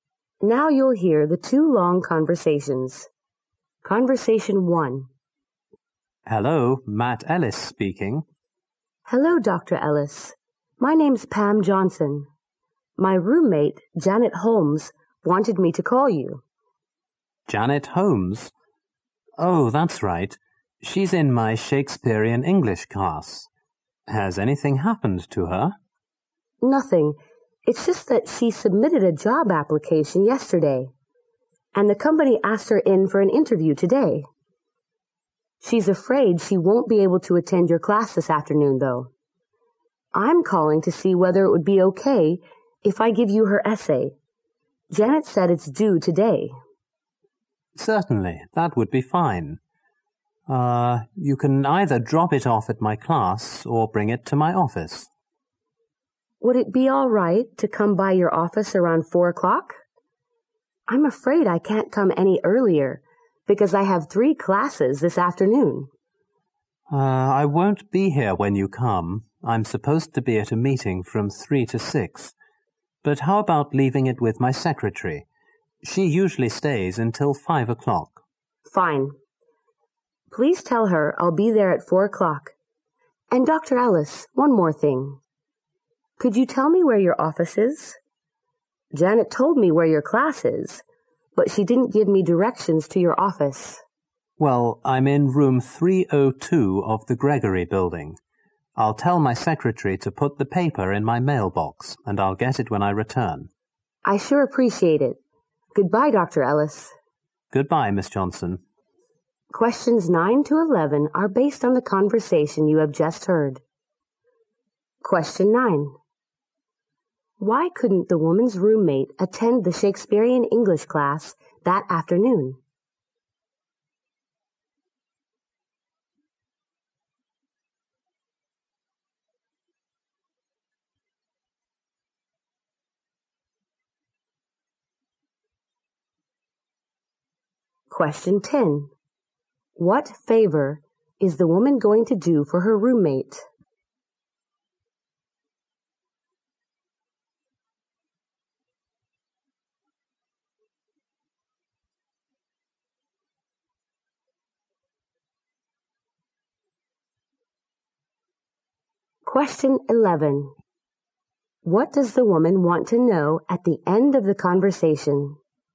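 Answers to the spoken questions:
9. She had a job interview.
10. Hand in her essay to Dr. Ellis.
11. Where Dr. Ellis's office is.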